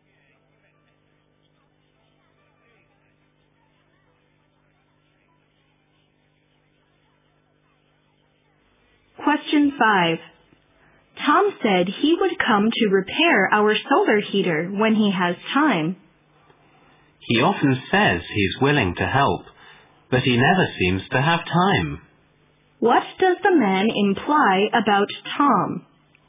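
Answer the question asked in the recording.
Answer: Tom says he will help but never actually finds time to do it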